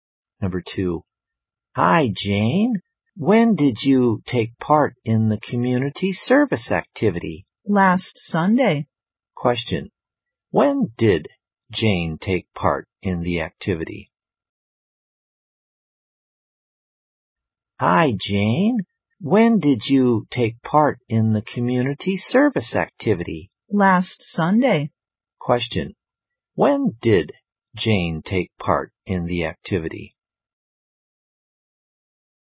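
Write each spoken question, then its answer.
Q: When did Jane take part in the activity?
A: Last Sunday.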